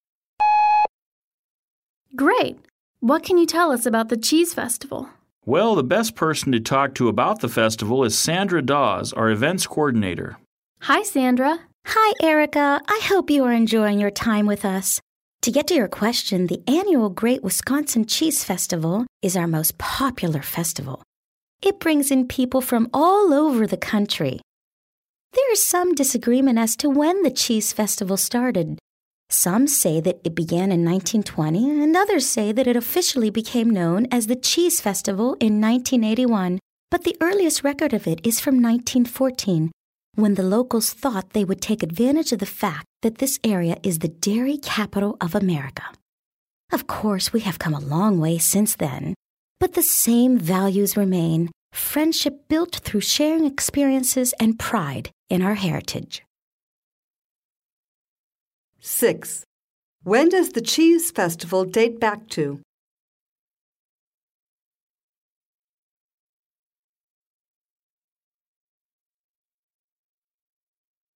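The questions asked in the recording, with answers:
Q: When does the Cheese Festival date back to?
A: 1914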